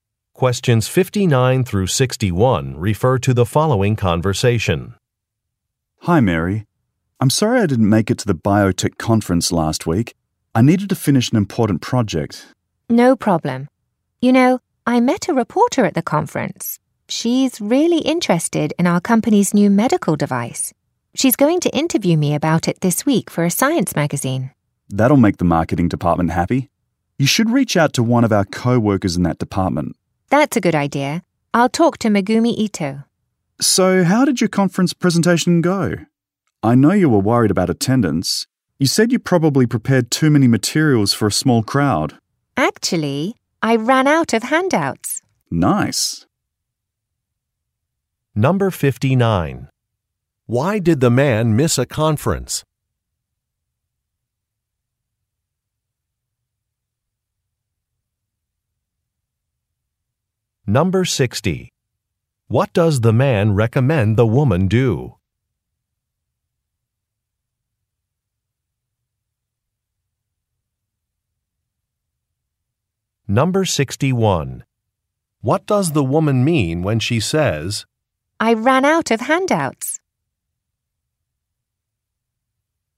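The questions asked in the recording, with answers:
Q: Why did the man miss a conference?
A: He needed to finish an important project.

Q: What does the man recommend the woman do?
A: Contact a co-worker in the marketing department.

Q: What does the woman mean when she says,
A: More people came to her presentation than she expected.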